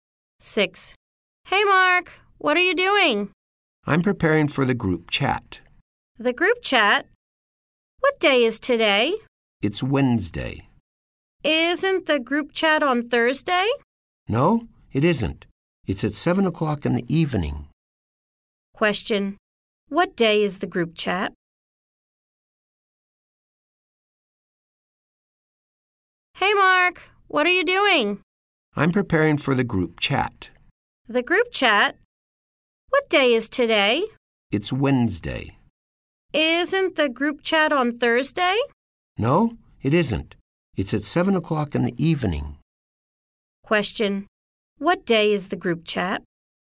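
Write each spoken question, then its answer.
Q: What day is the group chat?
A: Wednesday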